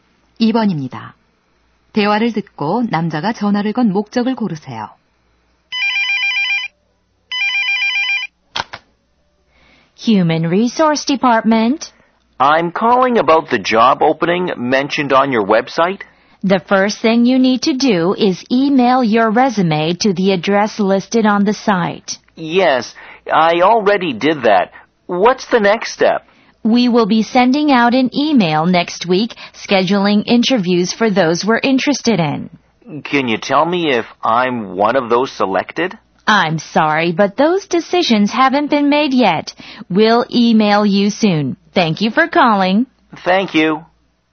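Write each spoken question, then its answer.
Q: 대화를 듣고 남자가 전화를 건 목적을 고르세요.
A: 채용 진행 상황(면접 대상 선정 여부)을 문의하려고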